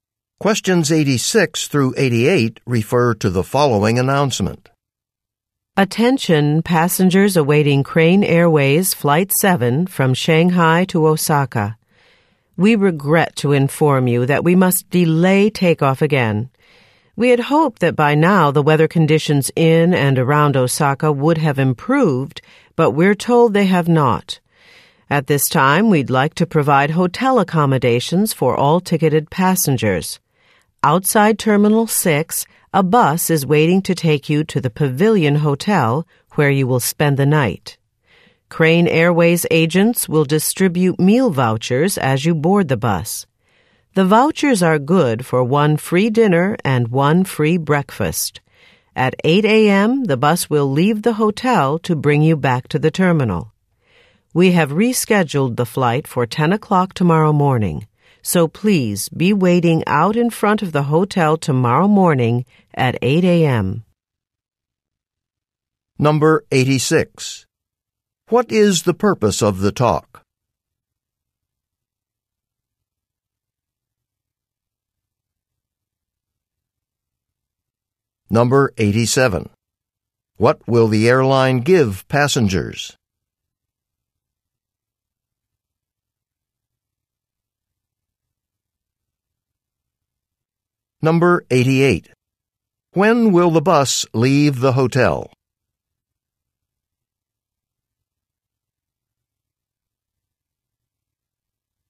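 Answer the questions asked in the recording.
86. To announce a flight delay
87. Meal vouchers and hotel rooms
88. At 8 a.m.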